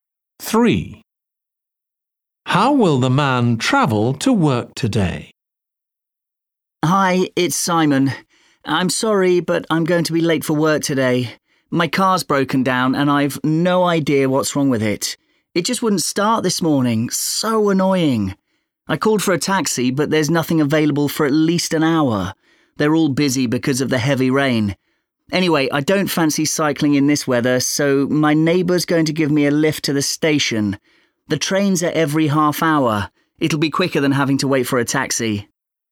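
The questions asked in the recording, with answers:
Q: How will the man travel to work today?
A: by train (his neighbour gives him a lift to the station)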